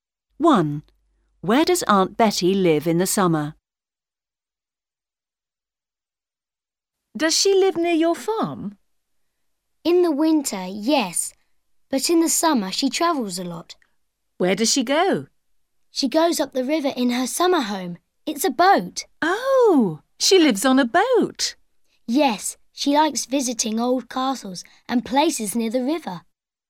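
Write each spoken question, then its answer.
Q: Where does Aunt Betty live in the summer?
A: On a boat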